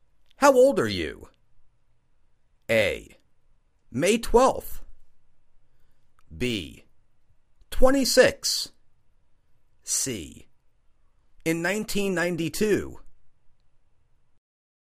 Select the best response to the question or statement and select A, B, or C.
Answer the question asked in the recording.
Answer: Twenty-six.